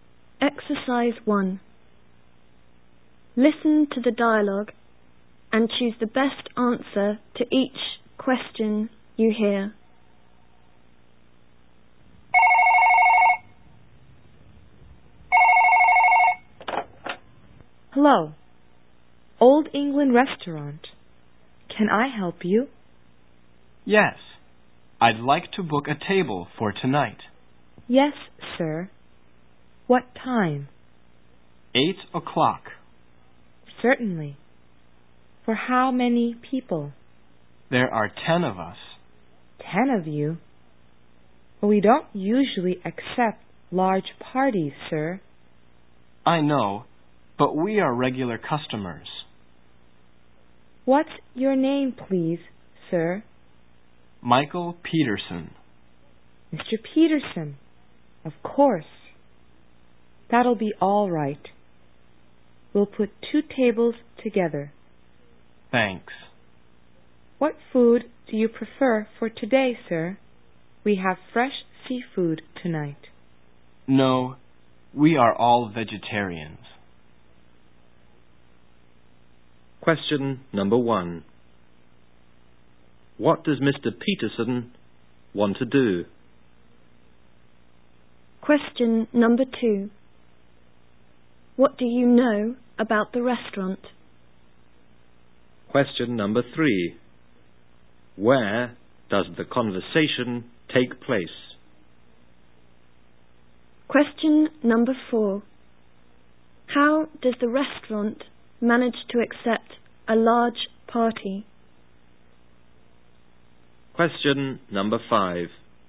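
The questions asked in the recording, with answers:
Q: What does Mr. Peterson want to do?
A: Book a table for 10 people at 8 o'clock tonight

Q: How does the restaurant manage to accept a large party?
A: By putting 2 tables together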